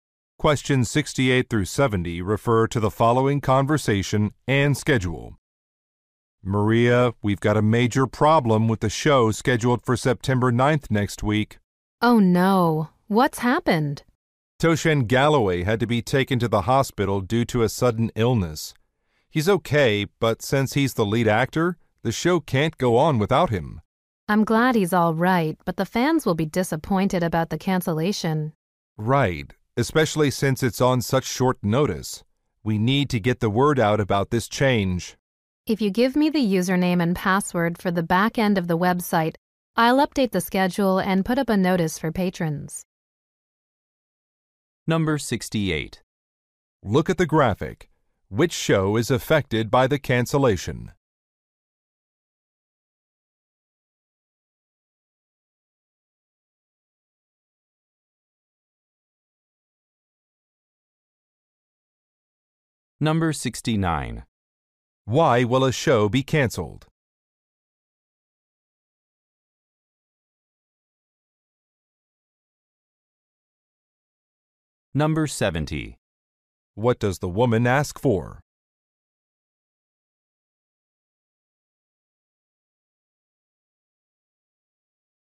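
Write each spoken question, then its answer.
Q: Why will a show be cancelled?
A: The lead actor is ill

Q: What does the woman ask for?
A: The website username and password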